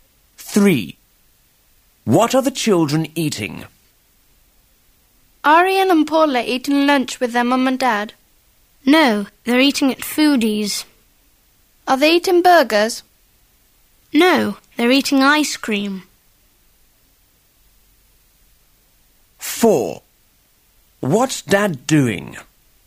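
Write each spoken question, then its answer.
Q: What are the children eating?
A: Ice cream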